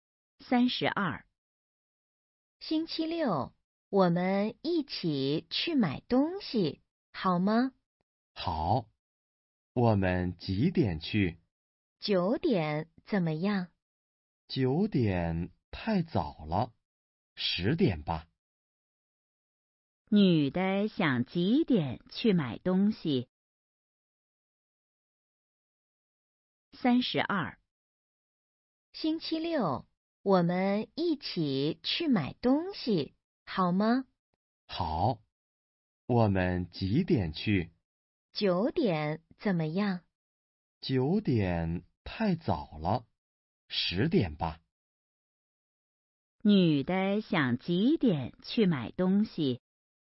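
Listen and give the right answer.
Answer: 十点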